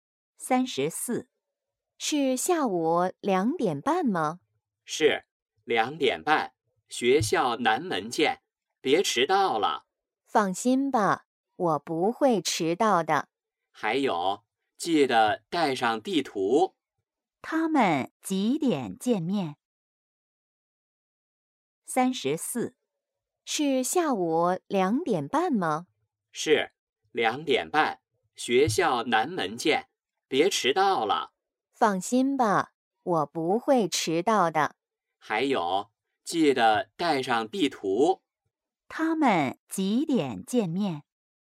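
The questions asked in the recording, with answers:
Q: 他们几点见面?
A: 下午2:30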